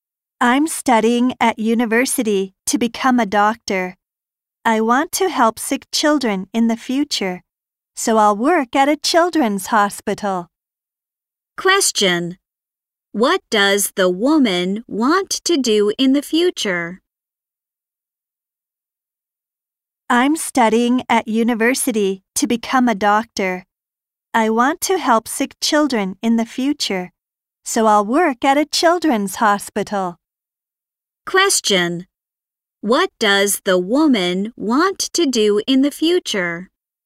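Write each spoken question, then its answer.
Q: What does the woman want to do in the future?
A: Work as a doctor at a children's hospital, helping sick children.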